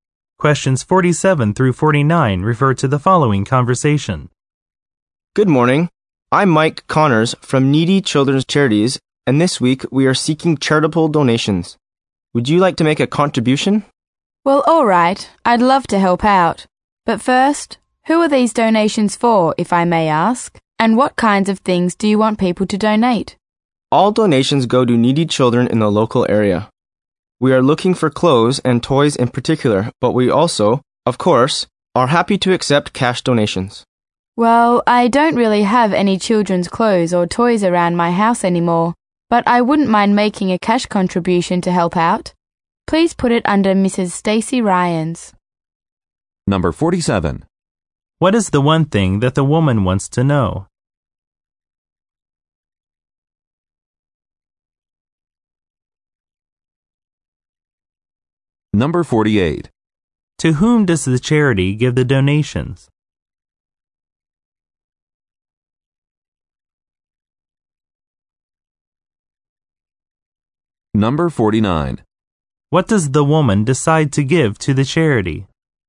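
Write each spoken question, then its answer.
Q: To whom does the charity give the donations?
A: Needy children in the local area

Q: What does the woman decide to give to the charity?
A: Cash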